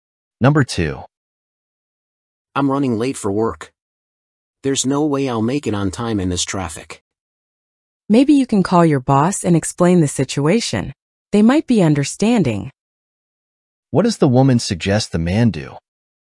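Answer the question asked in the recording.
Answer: Call his boss and explain the situation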